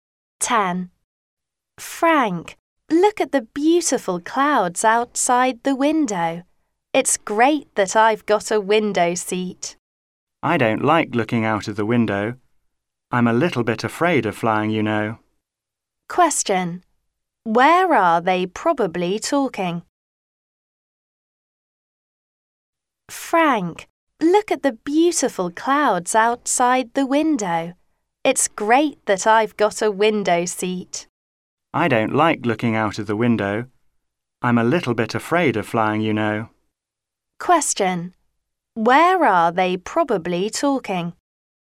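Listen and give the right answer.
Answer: On a plane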